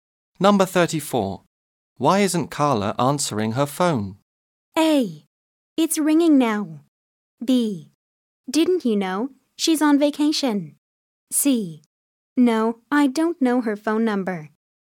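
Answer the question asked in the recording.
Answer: B: Didn't you know? She's on vacation.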